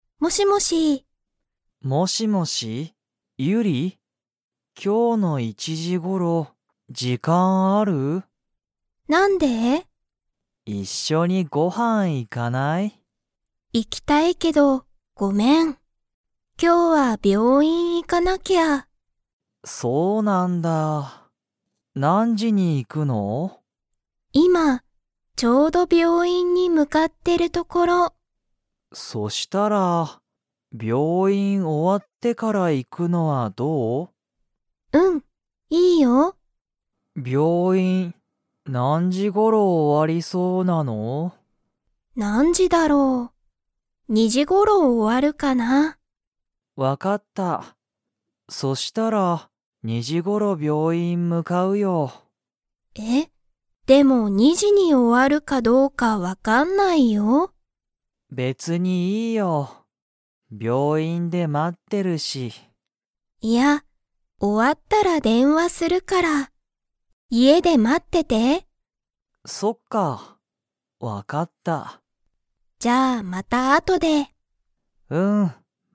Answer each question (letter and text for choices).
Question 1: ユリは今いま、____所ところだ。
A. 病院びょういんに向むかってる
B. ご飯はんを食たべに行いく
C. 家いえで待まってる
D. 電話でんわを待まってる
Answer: A. 病院びょういんに向むかってる

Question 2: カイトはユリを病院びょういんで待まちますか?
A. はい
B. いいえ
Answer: B. いいえ

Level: Level 2